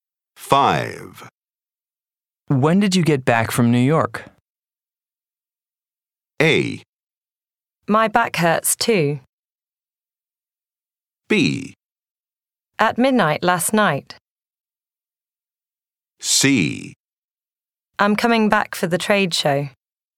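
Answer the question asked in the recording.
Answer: B: At midnight last night.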